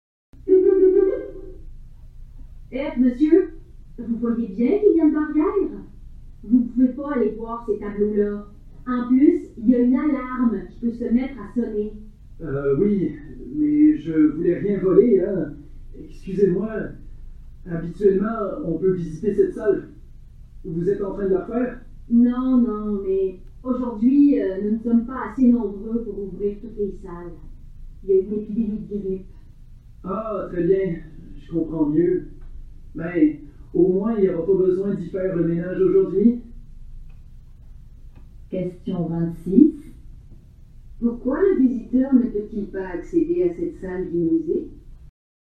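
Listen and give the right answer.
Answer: Il n'y a pas assez de personnel à cause d'une épidémie de grippe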